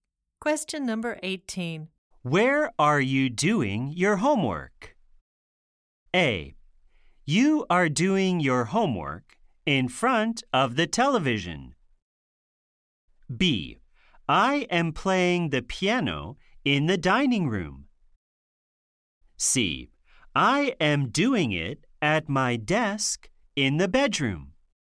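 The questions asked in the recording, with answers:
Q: Where are you doing your homework?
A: C: I am doing it at my desk in the bedroom.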